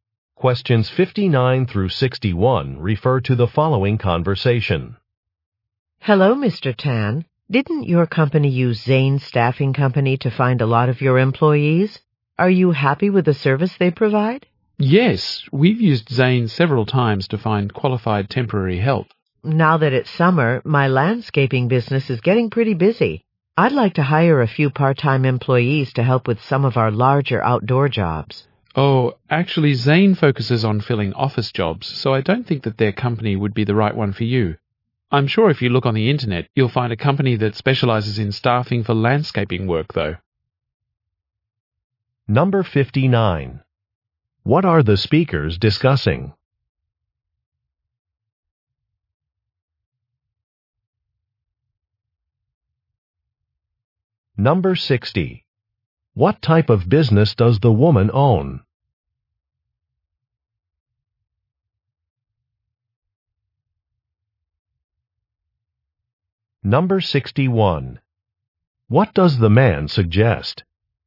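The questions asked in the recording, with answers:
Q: What are the speakers discussing?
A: A staffing company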